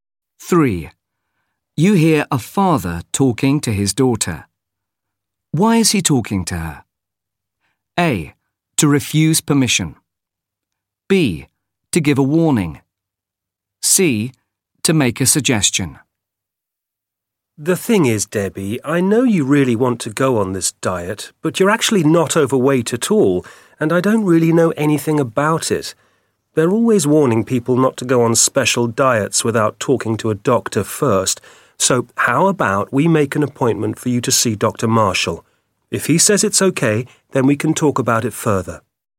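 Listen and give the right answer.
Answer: C: To make a suggestion.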